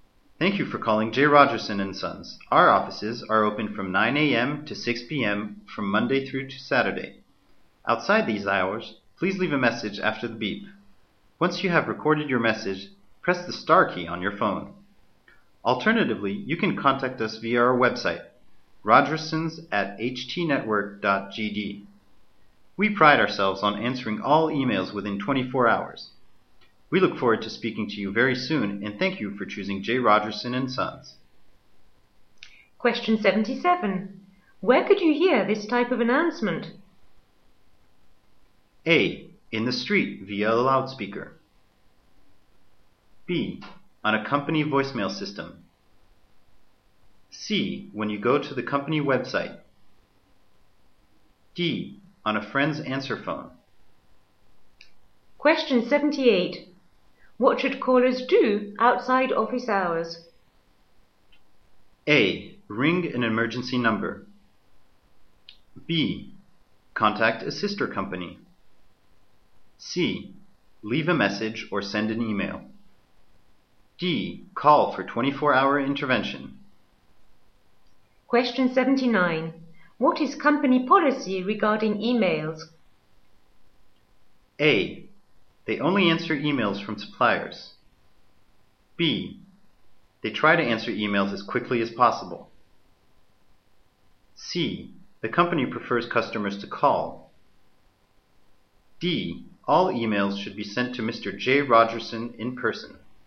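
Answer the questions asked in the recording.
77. B: On a company voicemail system.
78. C: Leave a message or send an email.
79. B: They try to answer emails as quickly as possible.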